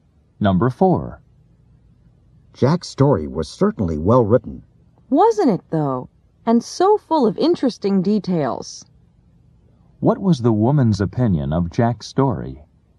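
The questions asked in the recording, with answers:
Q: What was the woman's opinion of Jack's story?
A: It was well written and full of interesting details.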